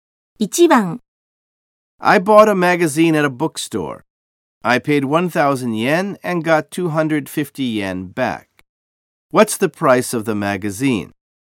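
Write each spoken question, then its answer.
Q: What's the price of the magazine?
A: 750 yen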